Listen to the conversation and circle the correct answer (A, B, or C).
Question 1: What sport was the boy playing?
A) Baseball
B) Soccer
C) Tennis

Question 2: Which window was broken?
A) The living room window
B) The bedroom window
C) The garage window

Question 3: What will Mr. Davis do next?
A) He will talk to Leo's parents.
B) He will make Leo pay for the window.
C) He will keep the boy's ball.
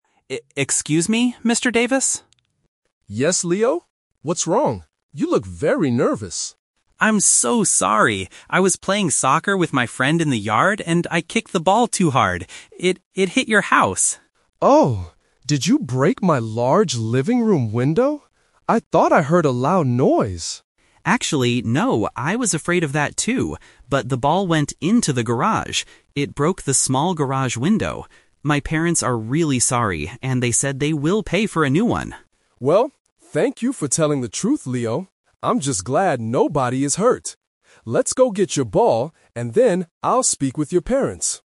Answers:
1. B
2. C
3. A

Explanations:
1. Leo clearly says, "I was playing soccer with my friend". Options (A) and (C) are plausible sports but are not mentioned in the audio.
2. This is the "Twist". Mr. Davis asks if he broke the living room window (Option A - Trap), but Leo clarifies, "Actually, no... It broke the small garage window." Option (B) is not mentioned.
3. At the end of the conversation, Mr. Davis says, "I'll speak with your parents." Option (B) is a trap because Leo's parents will pay, not Leo himself. Option (C) is a trap because Mr. Davis says, "Let's go get your ball," meaning he will give it back, not keep it.

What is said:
Leo: E-excuse me, Mr. Davis?
Mr. Davis (Neighbor): Yes, Leo? What's wrong? You look very nervous.
Leo: I'm so sorry! I was playing soccer with my friend in the yard, and I kicked the ball too hard. It... it hit your house.
Mr. Davis: Oh! Did you break my large living room window? I thought I heard a loud noise!
Leo: Actually, no. I was afraid of that too, but the ball went into the garage. It broke the small garage window. My parents are really sorry, and they said they will pay for a new one.
Mr. Davis: Well, thank you for telling the truth, Leo. I'm just glad nobody is hurt. Let's go get your ball, and then I'll speak with your parents.

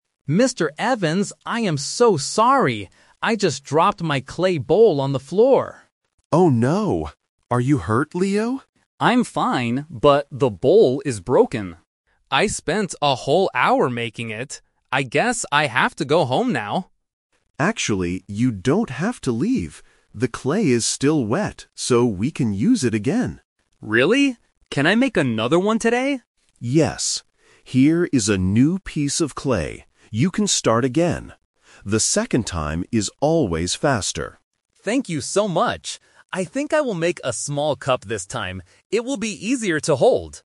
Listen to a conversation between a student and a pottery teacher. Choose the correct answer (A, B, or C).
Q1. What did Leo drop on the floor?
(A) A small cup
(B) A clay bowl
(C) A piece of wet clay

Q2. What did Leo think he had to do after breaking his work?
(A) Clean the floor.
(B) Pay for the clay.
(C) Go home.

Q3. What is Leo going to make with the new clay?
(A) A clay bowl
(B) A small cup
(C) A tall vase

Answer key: 1B, 2C, 3B

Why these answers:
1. Leo states the problem clearly at the beginning: "I just dropped my clay bowl on the floor."
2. Leo says: "I guess I have to go home now."
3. At the end, Leo changes his plan: "I think I will make a small cup this time."

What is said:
Leo: Mr. Evans, I am so sorry! I just dropped my clay bowl on the floor.
Mr. Evans: Oh no. Are you hurt, Leo?
Leo: I'm fine, but the bowl is broken. I spent a whole hour making it. I guess I have to go home now.
Mr. Evans: Actually, you don't have to leave. The clay is still wet, so we can use it again.
Leo: Really? Can I make another one today?
Mr. Evans: Yes. Here is a new piece of clay. You can start again. The second time is always faster.
Leo: Thank you so much! I think I will make a small cup this time. It will be easier to hold!

